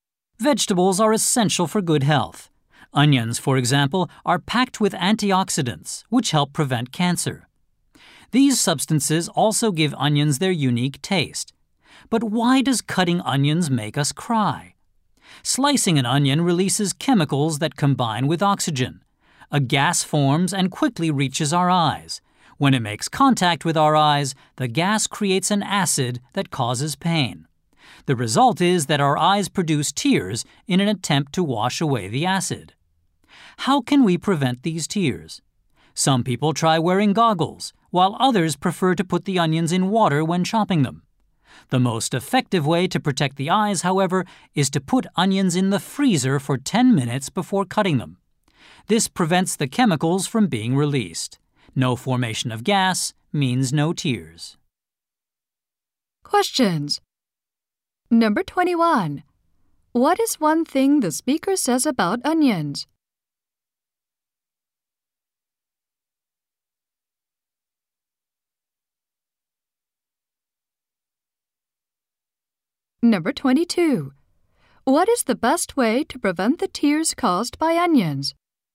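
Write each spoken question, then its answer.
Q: What is the best way to prevent the tears caused by onions?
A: Put the onions in the freezer for 10 minutes before cutting them.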